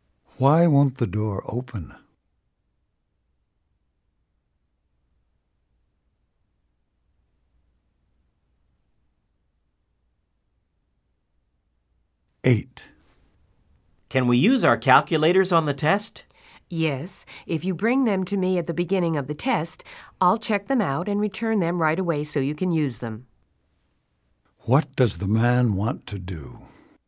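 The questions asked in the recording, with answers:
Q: What does the man want to do?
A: Use his calculator on the test.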